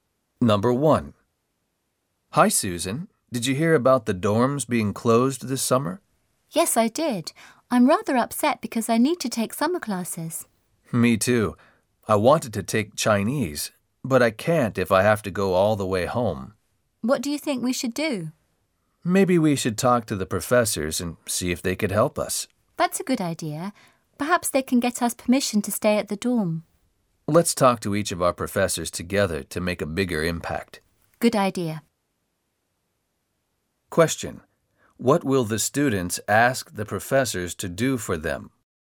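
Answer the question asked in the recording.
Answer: Help them get permission to stay at the dorm over the summer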